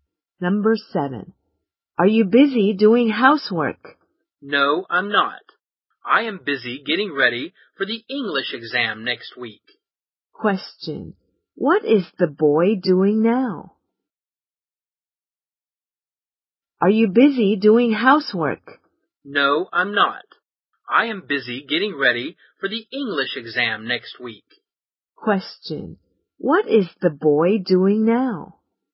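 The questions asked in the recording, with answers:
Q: What is the boy doing now?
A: Getting ready for the English exam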